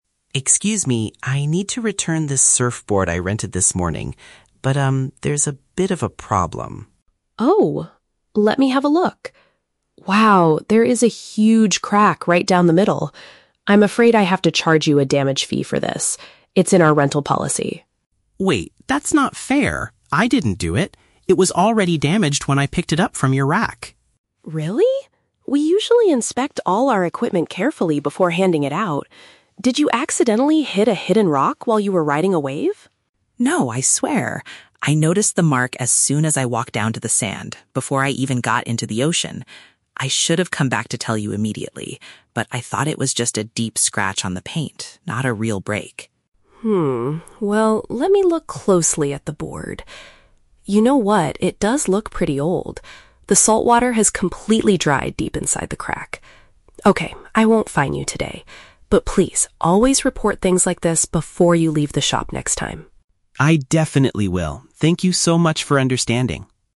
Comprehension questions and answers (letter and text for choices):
Listen to the conversation between a customer and a rental shop owner. Choose the correct answer (A, B, or C) for each question.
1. What is the initial conflict between the two speakers?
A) The customer is unhappy because the rental price is too high.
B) The owner wants to make the customer pay for a broken item.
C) The customer wants a full refund because the ocean waves were bad.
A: B) The owner wants to make the customer pay for a broken item.

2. How does the customer defend himself?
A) He claims the equipment was already flawed before he started surfing.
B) He proves that another surfer crashed into his board in the water.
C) He admits he made a mistake but refuses to pay the penalty.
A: A) He claims the equipment was already flawed before he started surfing.

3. Why does the owner finally agree not to penalize the customer?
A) Because the customer promises to buy a brand new board.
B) Because she feels sorry that his surfing trip was ruined.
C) Because the physical evidence shows the damage is not recent.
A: C) Because the physical evidence shows the damage is not recent.

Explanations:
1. The owner sees the crack and says, "I'm afraid I have to charge you a damage fee for this." This means she wants to make him pay (charge a fee) for a broken item (the cracked surfboard).
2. Mark says, "It was already damaged when I picked it up... before I even got into the ocean." Option A perfectly paraphrases this: the equipment was already flawed (damaged) before he started surfing.

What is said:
Mark: Excuse me. I need to return this surfboard I rented this morning. there's a bit of a problem.
Sarah: Oh? Let me have a look. Wow, there is a huge crack right down the middle. I'm afraid I have to charge you a damage fee for this. It's in our rental policy.
Mark: Wait, that's not fair! I didn't do it. It was already damaged when I picked it up from your rack.
Sarah: Really? We usually inspect all our equipment carefully before handing it out. Did you accidentally hit a hidden rock while you were riding a wave?
Mark: No, I swear! I noticed the mark as soon as I walked down to the sand, before I even got into the ocean. I should have come back to tell you immediately, but I thought it was just a deep scratch on the paint, not a real break.
Well, let me look closely at the board. You know what, it does look pretty old. The saltwater has completely dried deep inside the crack. Okay, I won't fine you today. But please, always report things like this before you leave the shop next time.
Mark: I definitely will. Thank you so much for understanding.